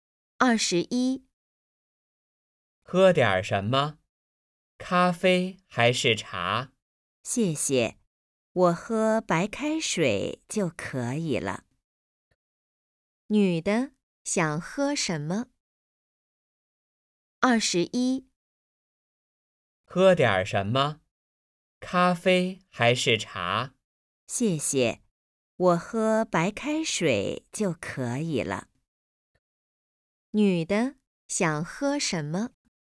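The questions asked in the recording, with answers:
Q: 女的想喝什么?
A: 白开水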